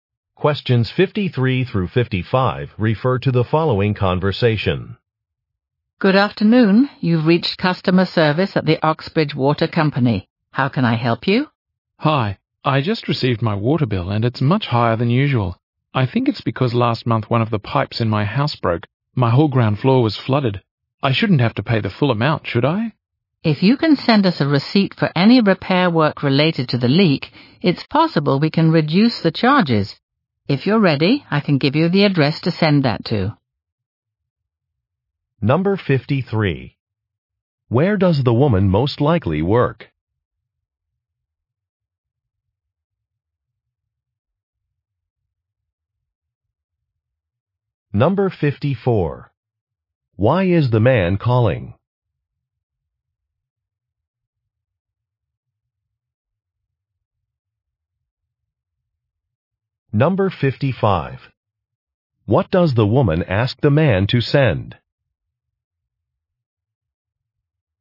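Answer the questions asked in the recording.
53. At a water company
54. His water bill is higher than usual
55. A receipt for the repair work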